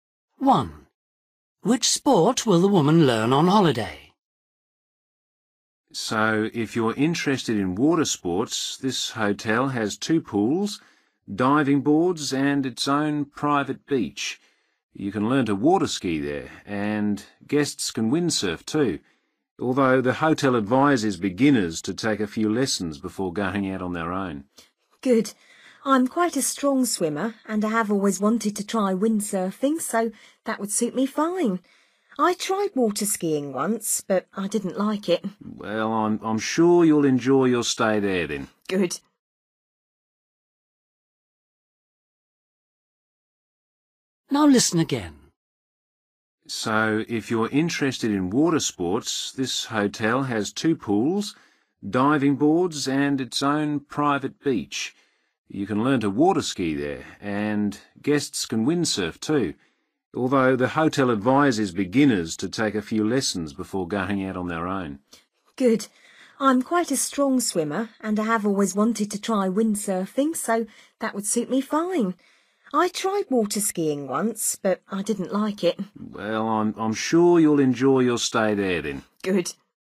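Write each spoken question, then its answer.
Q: Which sport will the woman learn on holiday?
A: windsurfing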